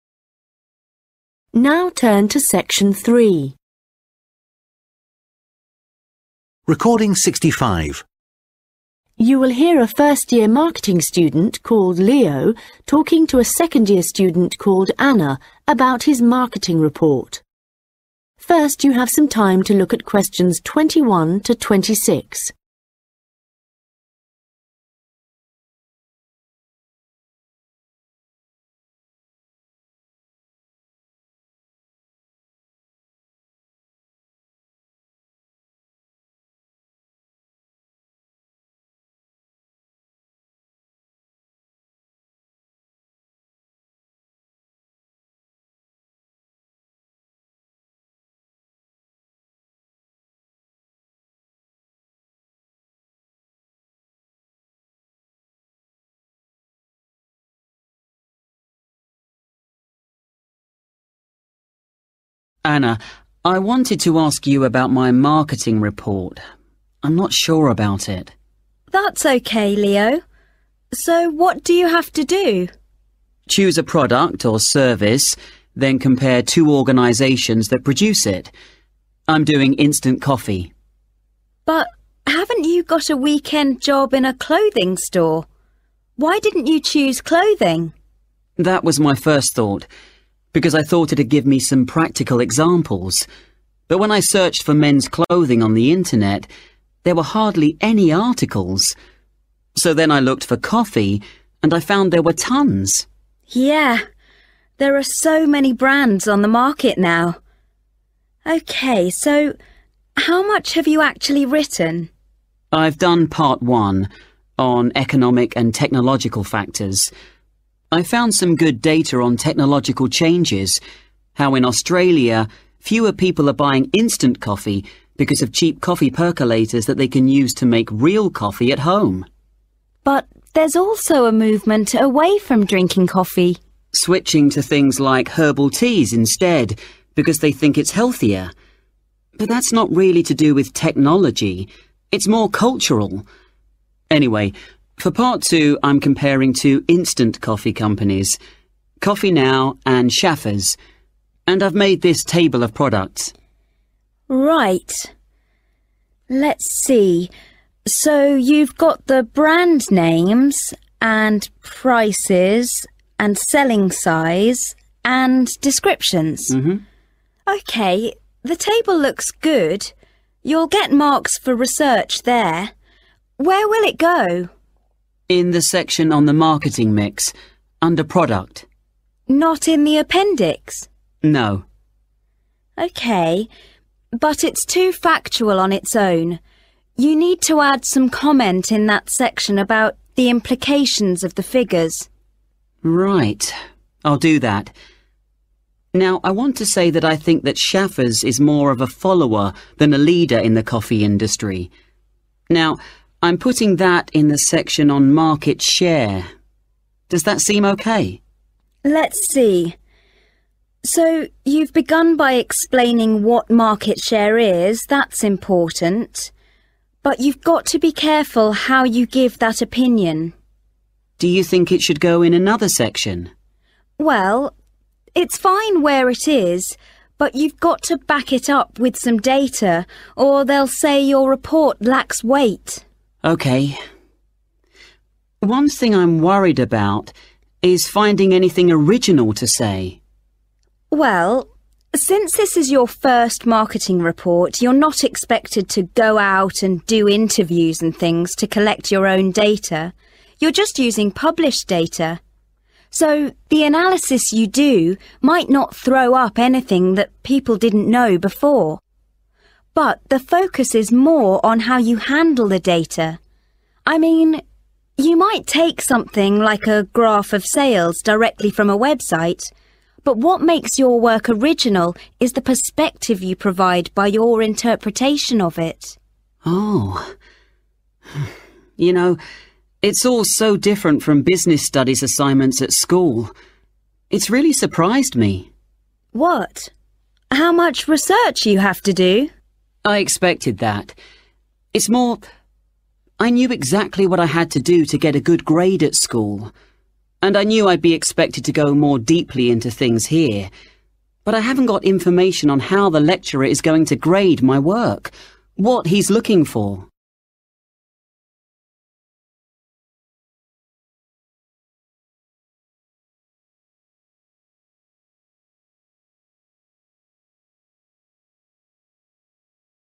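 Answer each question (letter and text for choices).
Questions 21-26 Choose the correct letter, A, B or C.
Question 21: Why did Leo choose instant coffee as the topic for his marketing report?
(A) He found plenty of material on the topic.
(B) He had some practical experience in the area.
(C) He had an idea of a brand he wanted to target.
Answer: (A) He found plenty of material on the topic.

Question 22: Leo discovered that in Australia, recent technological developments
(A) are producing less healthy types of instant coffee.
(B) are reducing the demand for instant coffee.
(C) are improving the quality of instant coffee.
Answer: (B) are reducing the demand for instant coffee.

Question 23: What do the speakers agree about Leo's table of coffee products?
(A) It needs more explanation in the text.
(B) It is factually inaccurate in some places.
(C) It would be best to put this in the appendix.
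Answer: (A) It needs more explanation in the text.

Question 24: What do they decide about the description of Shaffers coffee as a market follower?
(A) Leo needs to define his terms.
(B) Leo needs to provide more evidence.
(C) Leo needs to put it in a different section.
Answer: (B) Leo needs to provide more evidence.

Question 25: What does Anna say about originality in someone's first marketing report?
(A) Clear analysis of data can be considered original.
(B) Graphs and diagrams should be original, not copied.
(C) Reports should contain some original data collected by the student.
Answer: (A) Clear analysis of data can be considered original.

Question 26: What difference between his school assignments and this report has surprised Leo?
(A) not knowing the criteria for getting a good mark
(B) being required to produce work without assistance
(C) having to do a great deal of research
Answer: (A) not knowing the criteria for getting a good mark

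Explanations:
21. Leo: That was my first thought because I thought it'd give me some practical examples, but when I searched for men's clothing on the Internet there were hardly any articles. So then I looked for coffee and I fo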